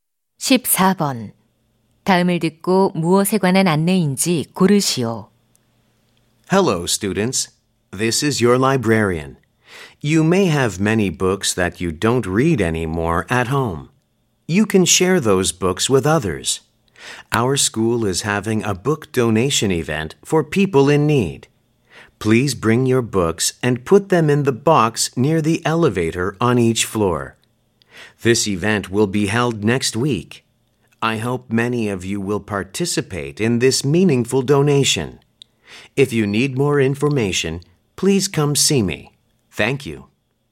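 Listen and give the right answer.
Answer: 학교 도서 기부 행사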